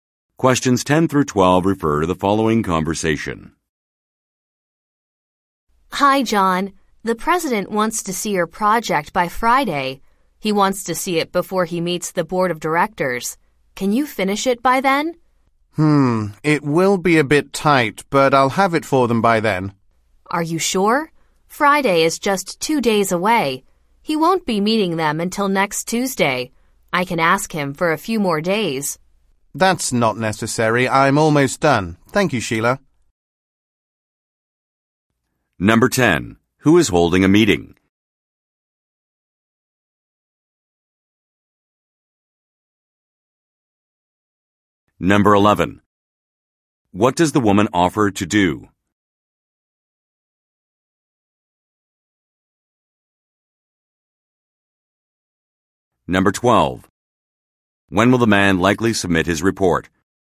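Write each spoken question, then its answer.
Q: Who is holding a meeting?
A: The president

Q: What does the woman offer to do?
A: Ask the president for a few more days

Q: When will the man likely submit his report?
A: By Friday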